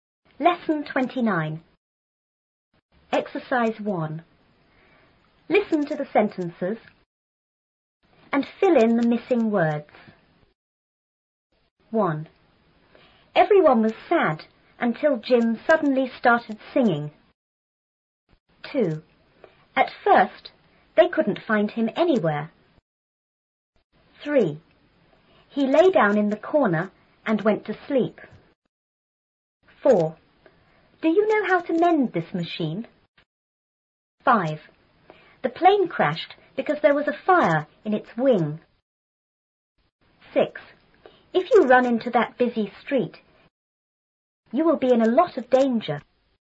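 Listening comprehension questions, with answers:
1.Listen to the sentences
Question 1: ___was sad until Jim___started singing.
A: Everyone / suddenly

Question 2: At___,they couldn't find him___.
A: first / anywhere

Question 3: He___down in the___and went to sleep.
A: lay / corner

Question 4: Do you know how to___this___?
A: mend / machine

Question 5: The plane___because there was a fire in its___.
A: crashed / wing

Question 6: you will be___a lot of___.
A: in / danger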